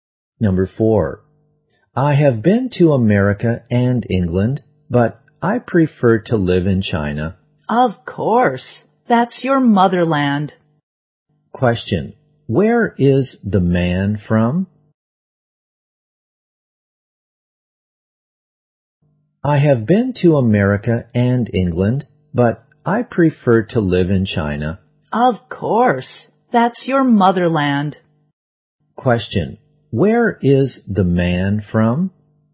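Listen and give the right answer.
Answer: China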